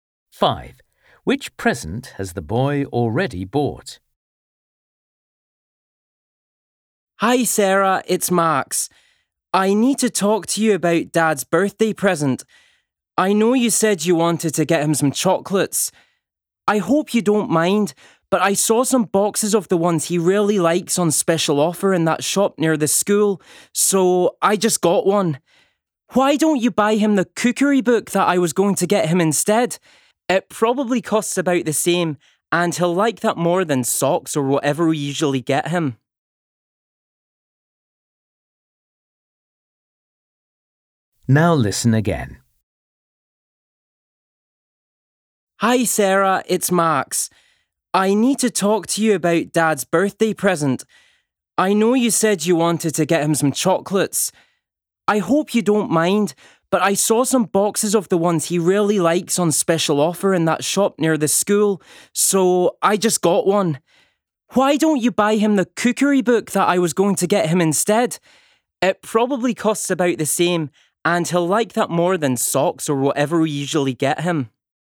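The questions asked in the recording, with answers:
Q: Which present has the boy already bought?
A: a box of chocolates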